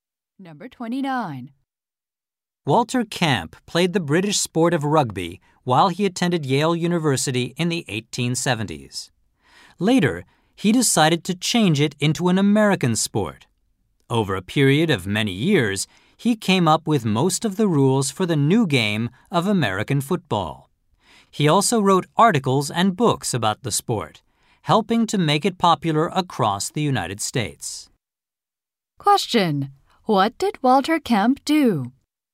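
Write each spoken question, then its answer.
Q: What did Walter Camp do?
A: He created most of the rules of American football.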